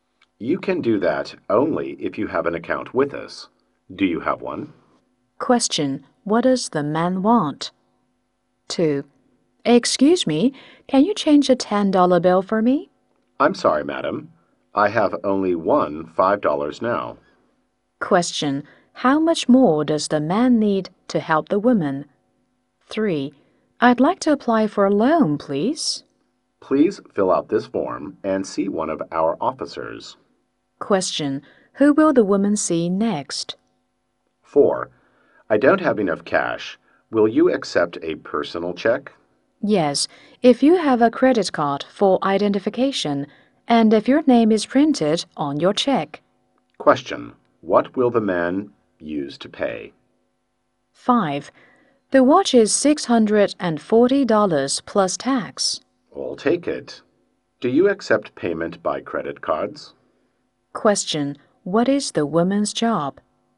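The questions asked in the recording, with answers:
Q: What does the man want?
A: To cash a check

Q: Who will the woman see next?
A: One of the bank's (loan) officers

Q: What will the man use to pay?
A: A personal check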